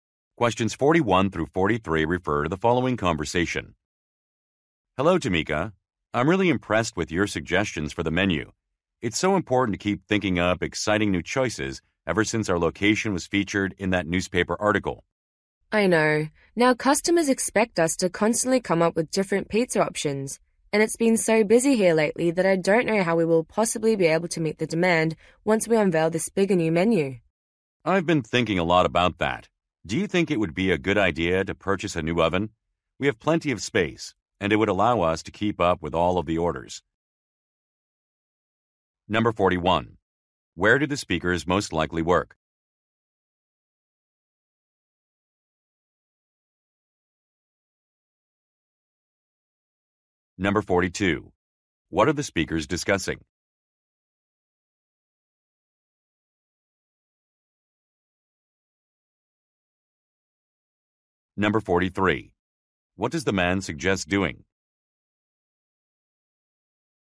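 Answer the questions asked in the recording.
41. At a pizza restaurant
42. Keeping up with demand for a new menu
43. Buying a new oven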